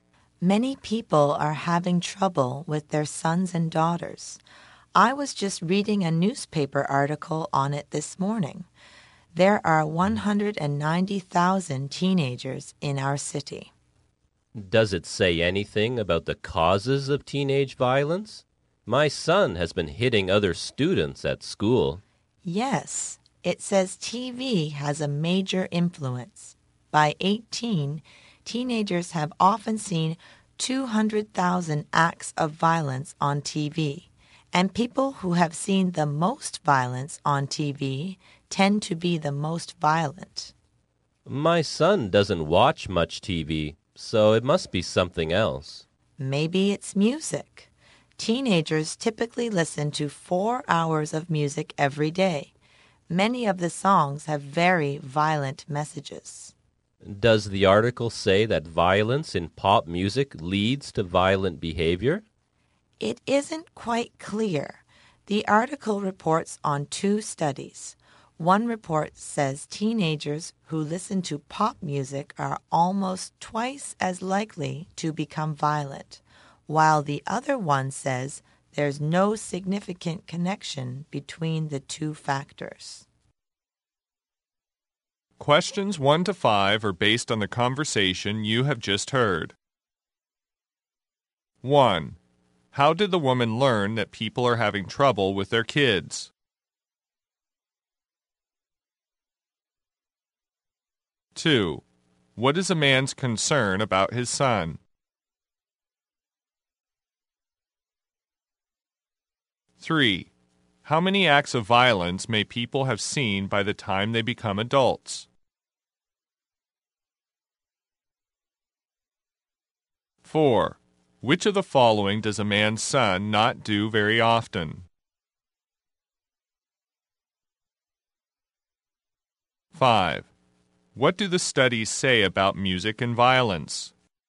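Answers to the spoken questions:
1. From a newspaper article
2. His son has been hitting other students
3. 200,000
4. Watch TV
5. They disagree; the results are unclear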